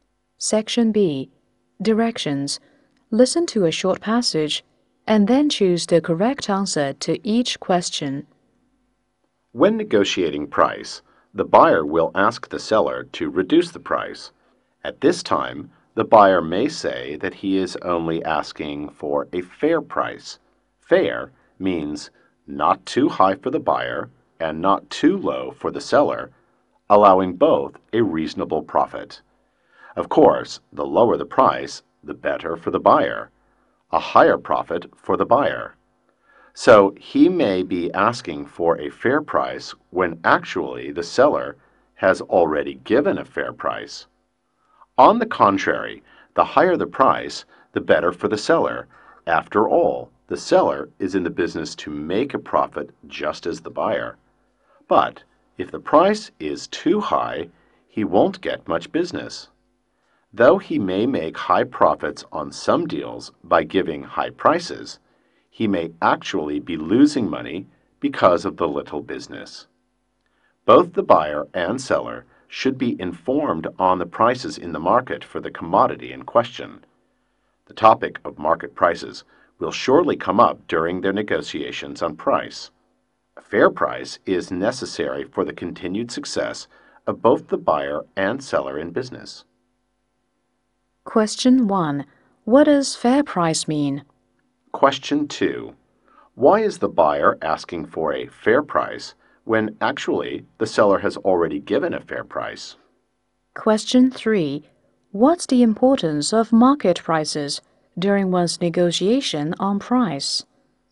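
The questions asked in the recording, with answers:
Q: What does fair price mean?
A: Not too high for the buyer and not too low for the seller, so both make a reasonable profit

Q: Why is the buyer asking for a fair price when actually the seller has already given a fair price?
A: Because the lower the price, the higher the buyer's profit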